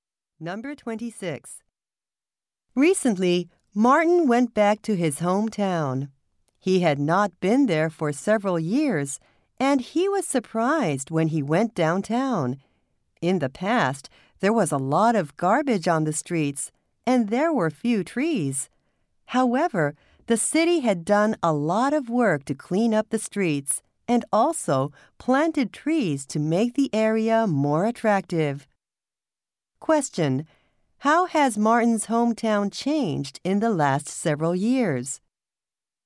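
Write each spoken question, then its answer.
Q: How has Martin's hometown changed in the last several years?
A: The streets are cleaner and trees have been planted.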